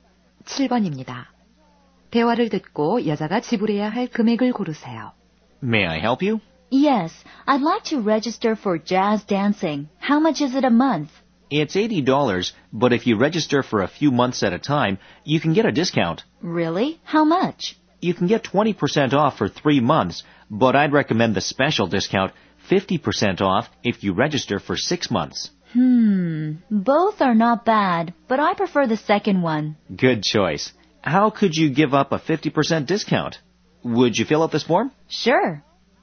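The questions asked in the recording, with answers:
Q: 대화를 듣고 여자가 지불해야 할 금액을 고르세요.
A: 240달러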